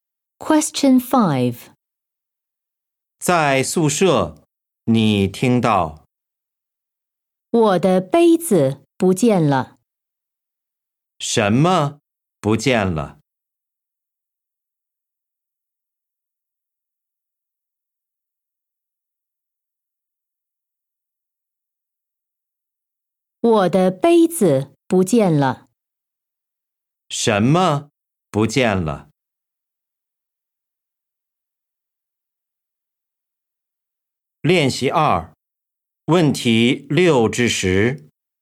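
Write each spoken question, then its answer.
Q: 什么不见了?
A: 杯子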